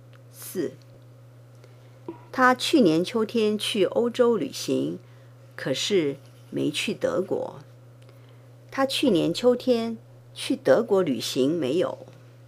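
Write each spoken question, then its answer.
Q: 他去年秋天去德国旅行没有?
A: 没有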